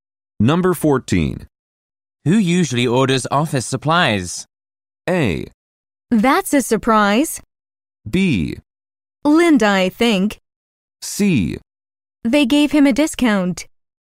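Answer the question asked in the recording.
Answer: B: Linda, I think.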